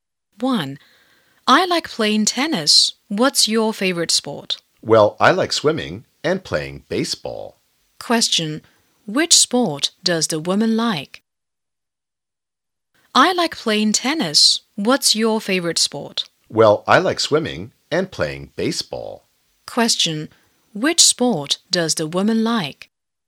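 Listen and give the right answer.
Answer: Swimming and baseball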